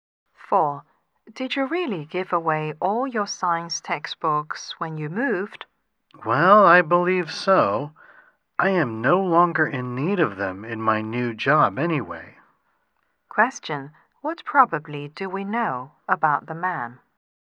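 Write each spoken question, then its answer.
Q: What probably do we know about the man?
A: He no longer needs science textbooks in his new job.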